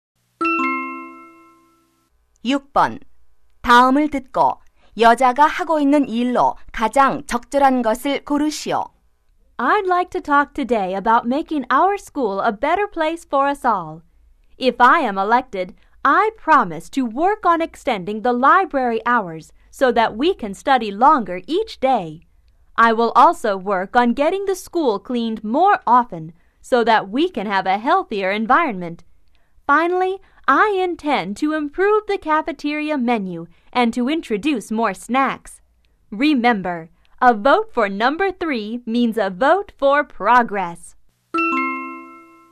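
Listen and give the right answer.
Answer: 학생회 선거 유세 연설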